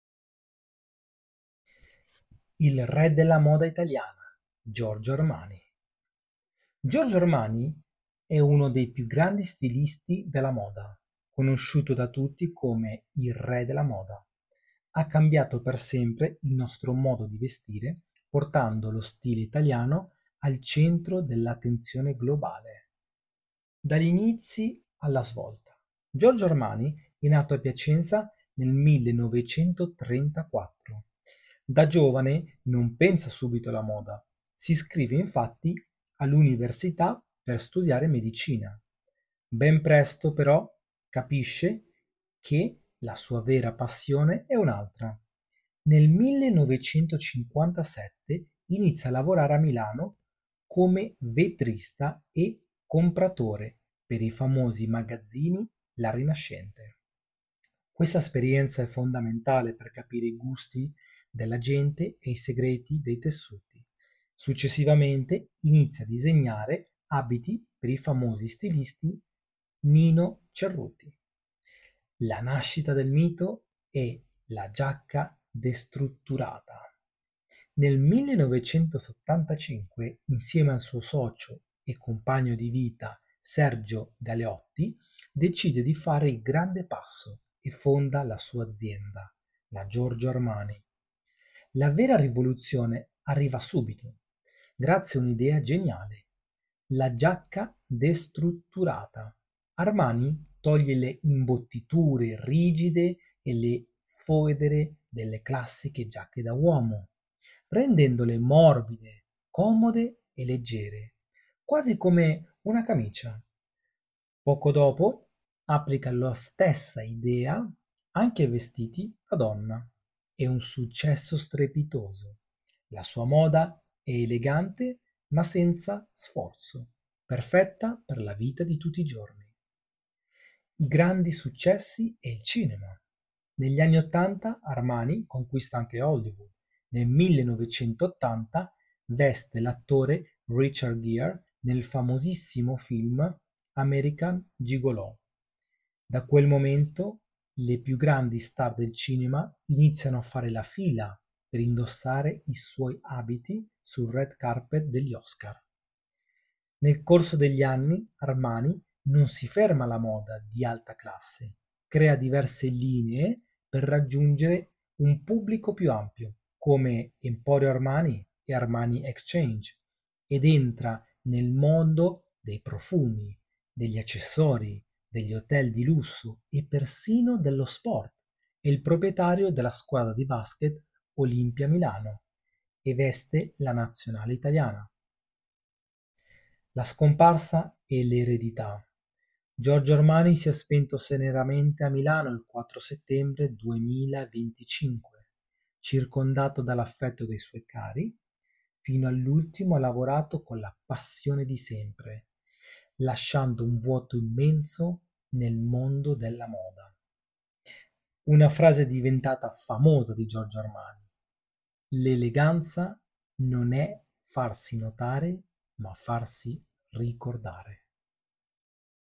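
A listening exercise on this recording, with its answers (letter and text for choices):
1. Quali studi ha fatto inizialmente Giorgio Armani prima di dedicarsi alla moda?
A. Giurisprudenza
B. Architettura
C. Medicina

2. Quale lavoro ha fatto Armani nel 1957 presso i magazzini La Rinascente?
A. Vetrinista e compratore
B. Sarto capo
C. Direttore generale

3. In quale anno è stata fondata l'azienda Giorgio Armani insieme a Sergio Galeotti?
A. 1910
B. 1975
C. 1990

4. Che cos'è la "giacca destrutturata", la celebre innovazione di Armani?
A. Una giacca impermeabile e sportiva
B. Una giacca adatta solo per i vestiti femminili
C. Una giacca classica priva di imbottiture rigide e fodere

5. Quale famoso attore di Hollywood ha vestito Giorgio Armani nel film American Gigolò del 1980?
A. Richard Gere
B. Al Pacino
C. Robert De Niro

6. Di quale squadra di basket è proprietario Giorgio Armani?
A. Virtus Bologna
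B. Olimpia Milano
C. Reyer Venezia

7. Quando si è spento Giorgio Armani, secondo quanto riportato nel testo?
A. Il 4 settembre 2001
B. Il 4 settembre 2010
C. Il 4 Settembre del 2025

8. Qual è il significato della famosa frase di Giorgio Armani sull'eleganza?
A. "L'eleganza è indossare sempre abiti costosi"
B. "L'eleganza non è farsi notare, ma farsi ricordare"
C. "L'eleganza è avere tanti soldi''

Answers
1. C. Medicina
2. A. Vetrinista e compratore
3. B. 1975
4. C. Una giacca classica priva di imbottiture rigide e fodere
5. A. Richard Gere
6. B. Olimpia Milano
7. C. Il 4 Settembre del 2025
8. B. "L'eleganza non è farsi notare, ma farsi ricordare"

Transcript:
Giorgio Armani è uno dei più grandi stilisti del mondo. Conosciuto da tutti come il "Re della moda", ha cambiato per sempre il nostro modo di vestire, portando lo stile italiano al centro dell'attenzione globale.
Dagli inizi alla svolta
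Giorgio Armani e' nato a Piacenza nel 1934. Da giovane non pensa subito alla moda: si iscrive infatti all'università per studiare medicina. Ben presto, però, capisce che la sua vera passione è un'altra.
Nel 1957 inizia a lavorare a Milano come vetrinista e compratore per i famosi magazzini La Rinascente. Questa esperienza è fondamentale per capire i gusti della gente e i segreti dei tessuti. Successivamente, inizia a disegnare abiti per il famoso stilista Nino Cerruti.
La nascita del mito e la "Giacca Destrutturata"
Nel 1975, insieme al suo socio e compagno di vita Sergio Galeotti, decide di fare il grande passo e fonda la sua azienda: la Giorgio Armani.
La vera rivoluzione arriva subito, grazie a un'idea geniale: la giacca destrutturata. Armani toglie le imbottiture rigide e le fodere dalle classiche giacche da uomo, rendendole morbide, comode e leggere, quasi come una camicia. Poco dopo, applica la stessa idea anche ai vestiti da donna. 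È un successo strepitoso: la sua moda è elegante ma senza sforzo, perfetta per la vita di tutti i giorni.
I grandi successi e il cinema
Negli anni '80, Armani conquista anche Hollywood. Nel 1980 veste l'attore Richard Gere nel famosissimo film American Gigolò. Da quel momento, le più grandi star del cinema iniziano a fare la fila per indossare i suoi abiti sul red carpet degli Oscar.
Nel corso degli anni, Armani non si ferma alla moda di alta classe. Crea diverse linee per raggiungere un pubblico più ampio, come Emporio Armani e Armani Exchange, ed entra nel mondo dei profumi, degli accessori, degli hotel di lusso e persino dello sport (è il proprietario della squadra di basket Olimpia Milano e veste la nazionale italiana).
La scomparsa e l'eredità
Giorgio Armani si è spento serenamente a Milano il 4 settembre 2025, circondato dall'affetto dei suoi cari. Fino all'ultimo ha lavorato con la passione di sempre, lasciando un vuoto immenso nel mondo della moda.
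Una frase diventata famosa di Giorgio armani: " L'eleganza non è farsi notare, ma farsi ricordare ".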